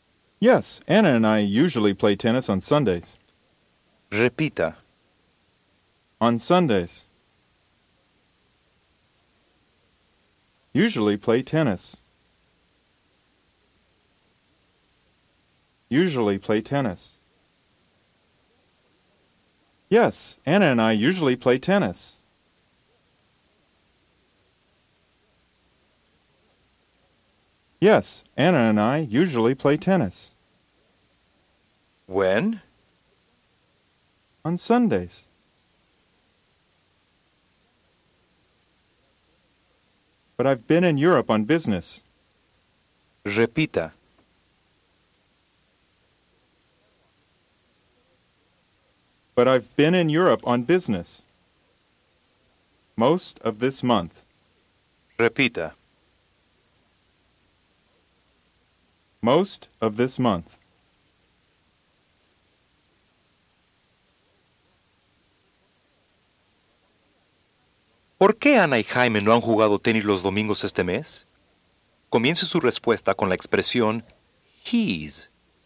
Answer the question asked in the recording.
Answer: He's been in Europe on business most of this month.